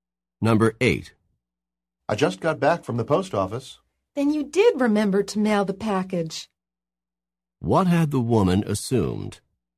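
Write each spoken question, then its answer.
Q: What had the woman assumed?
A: That the man had forgotten to mail the package.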